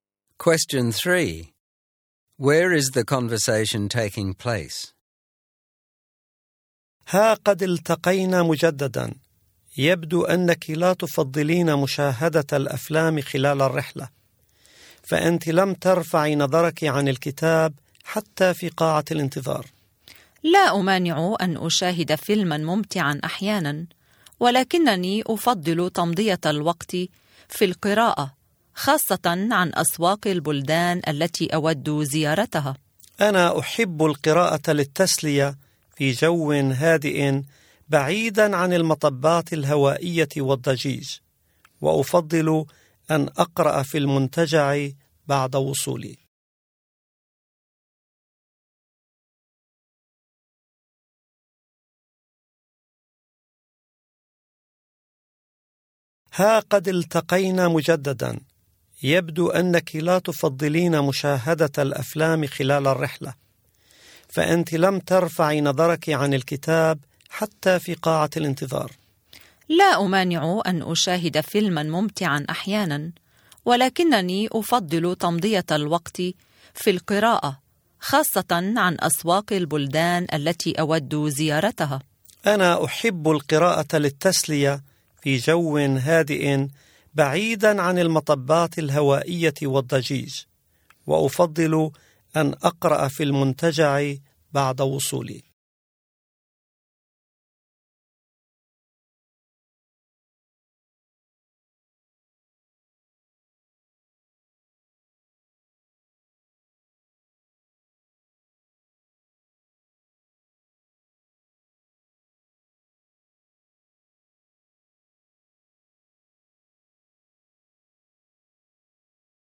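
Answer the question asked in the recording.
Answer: On a plane during a flight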